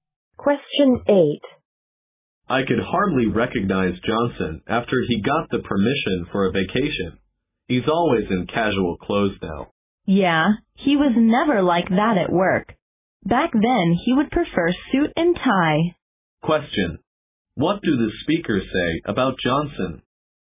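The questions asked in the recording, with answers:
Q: What do the speakers say about Johnson?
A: He now wears casual clothes, while at work he wore a suit and tie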